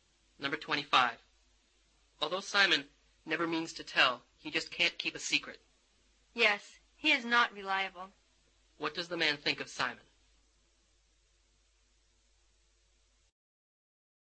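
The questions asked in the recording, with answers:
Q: What does the man think of Simon?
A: He is not reliable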